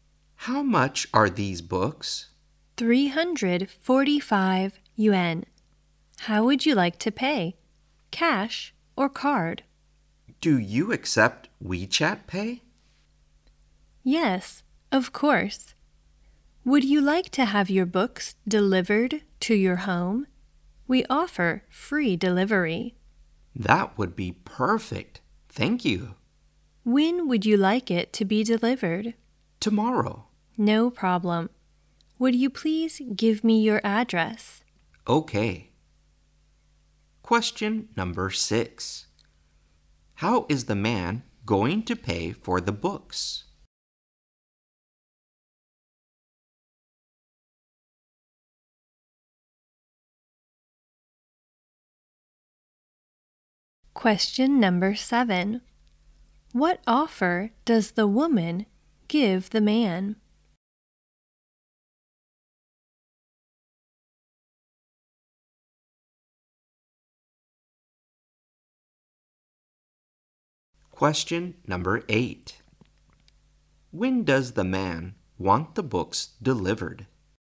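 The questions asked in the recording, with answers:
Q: How is the man going to pay for the books?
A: By WeChat Pay

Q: What offer does the woman give the man?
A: Free delivery

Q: When does the man want the books delivered?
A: Tomorrow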